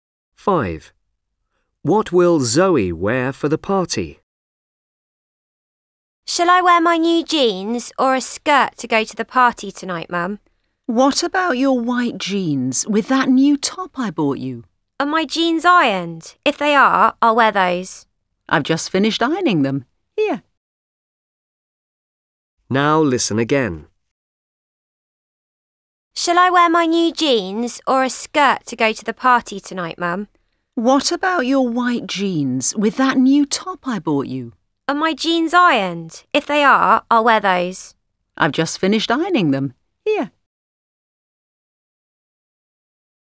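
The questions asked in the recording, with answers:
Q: What will Zoe wear for the party?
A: her white jeans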